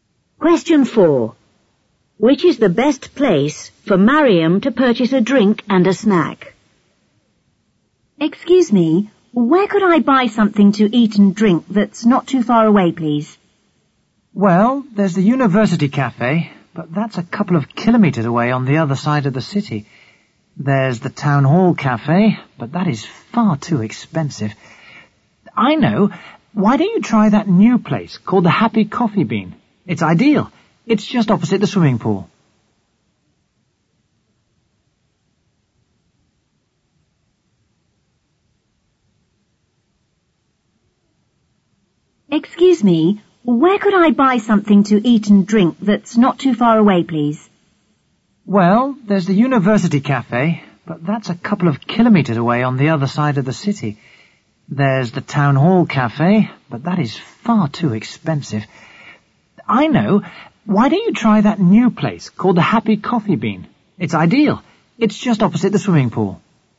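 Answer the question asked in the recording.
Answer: The Happy Coffee Bean, opposite the swimming pool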